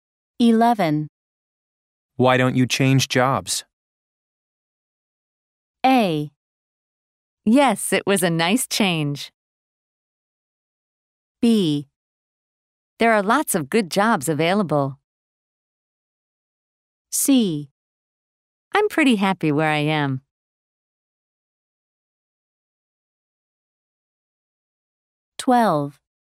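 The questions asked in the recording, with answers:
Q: Why don't you change jobs?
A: C: I'm pretty happy where I am.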